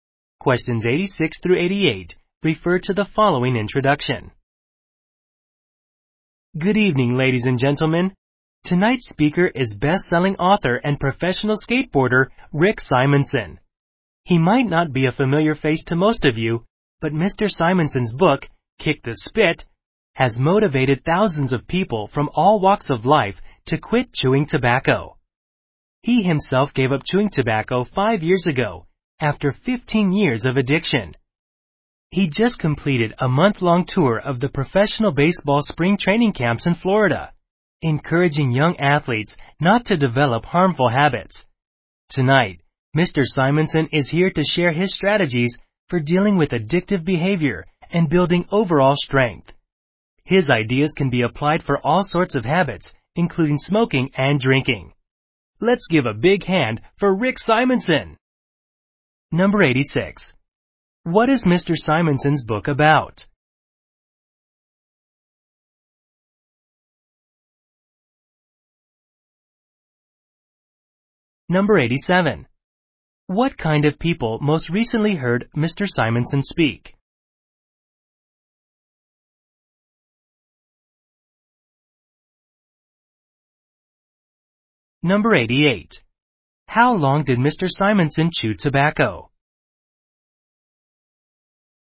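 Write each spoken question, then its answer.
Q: What is Mr. Simonson's book about?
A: Quitting chewing tobacco

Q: What kind of people most recently heard Mr.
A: Young baseball players

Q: How long did Mr. Simonson chew tobacco?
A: 15 years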